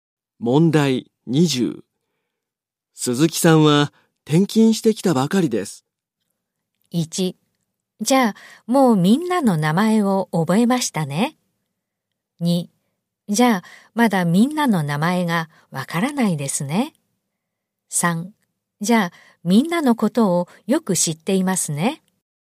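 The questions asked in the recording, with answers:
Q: 鈴木さんは転勤してきたばかりです。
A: 2: じゃあまだみんなの名前がわからないですね。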